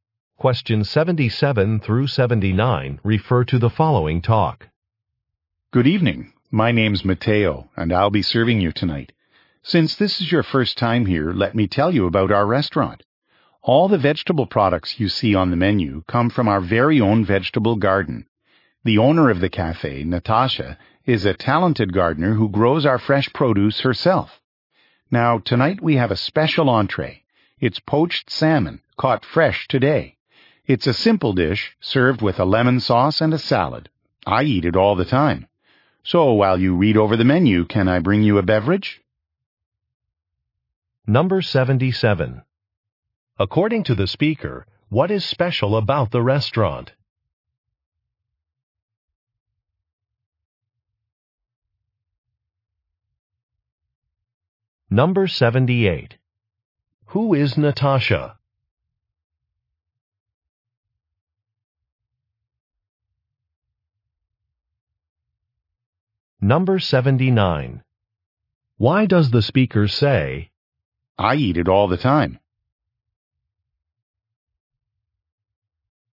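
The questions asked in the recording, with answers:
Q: According to the speaker, what is special about the restaurant?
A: Its vegetables come from its own garden

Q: Who is Natasha?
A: The cafe owner

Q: Why does the speaker say,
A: To recommend the special salmon dish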